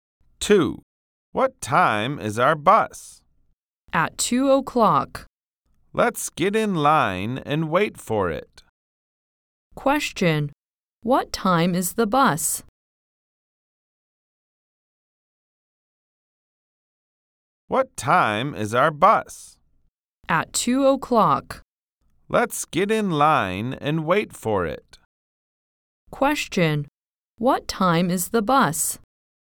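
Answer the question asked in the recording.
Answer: At 2:00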